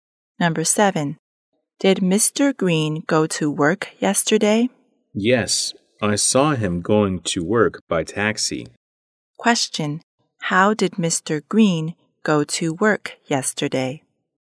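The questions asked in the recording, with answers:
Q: how did Mr. Green go to work yesterday?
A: By taxi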